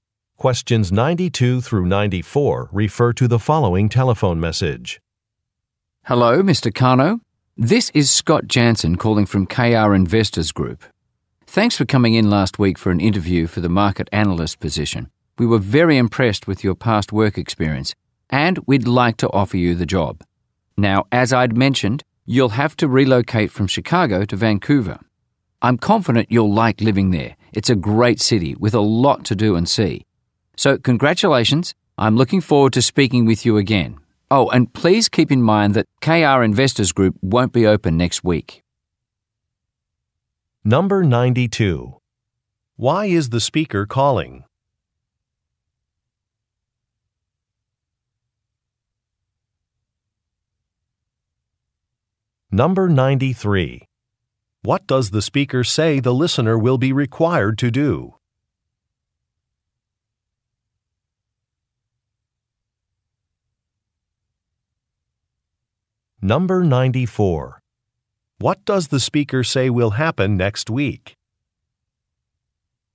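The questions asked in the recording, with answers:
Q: Why is the speaker calling?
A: To offer the listener a job

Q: What does the speaker say the listener will be required to do?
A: Relocate from Chicago to Vancouver

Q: What does the speaker say will happen next week?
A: KR Investors Group will be closed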